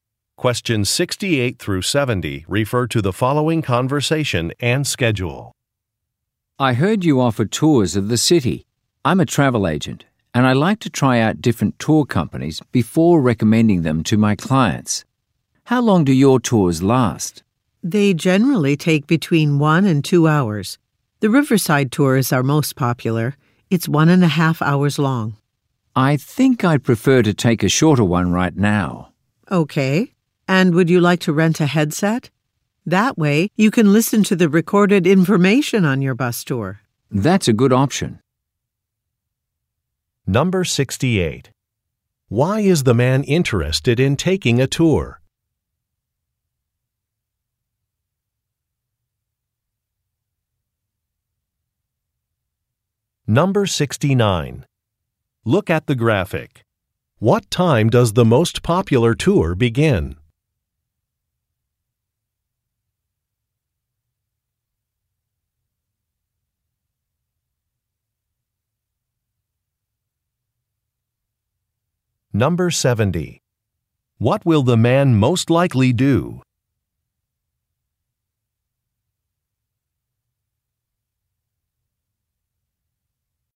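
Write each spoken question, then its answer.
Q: Why is the man interested in taking a tour?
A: He is a travel agent trying out tour companies before recommending them to his clients.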